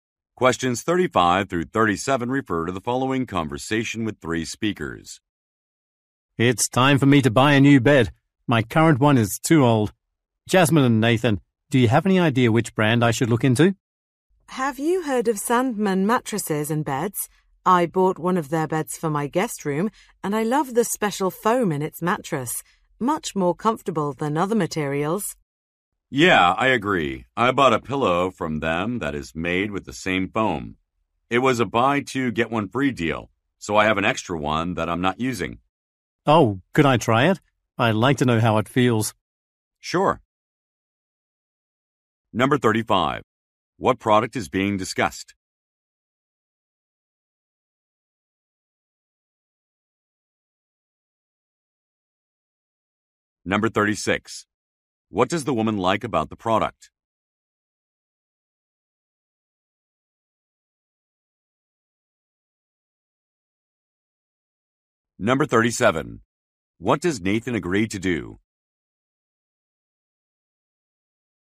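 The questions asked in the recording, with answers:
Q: What product is being discussed?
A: A bed (Sandman mattresses and beds)

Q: What does the woman like about the product?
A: The special foam in the mattress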